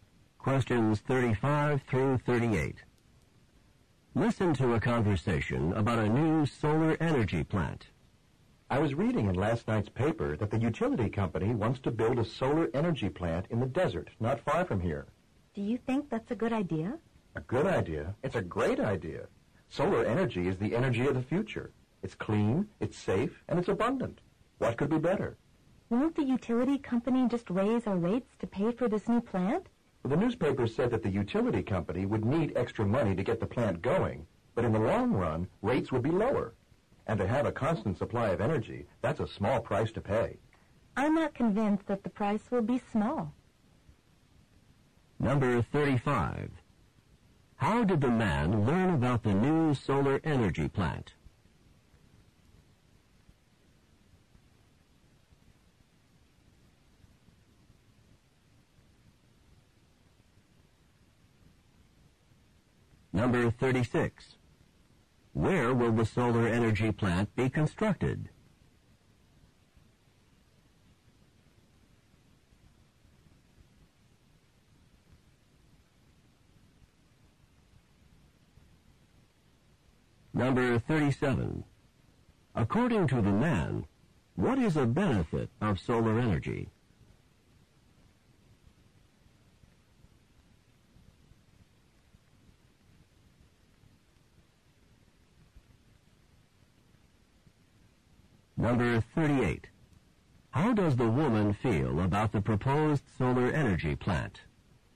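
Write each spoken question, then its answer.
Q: Where will the solar energy plant be constructed?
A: In the desert, not far from here

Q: According to the man, what is a benefit of solar energy?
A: It is clean, safe and abundant

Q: How does the woman feel about the proposed solar energy plant?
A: She isn't convinced; she worries it will cost a lot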